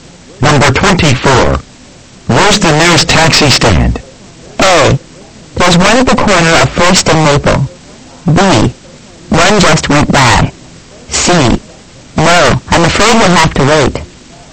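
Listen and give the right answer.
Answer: A: There's one at the corner of 1st and Maple.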